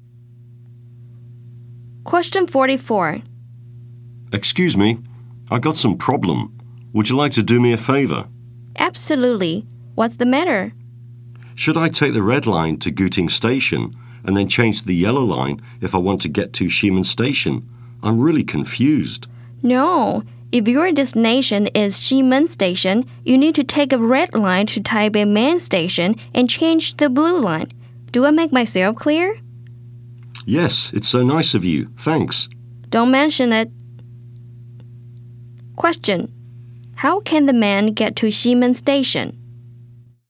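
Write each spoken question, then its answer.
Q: How can the man get to Xiamen Station?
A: Take the red line to Taipei Main Station and change to the blue line.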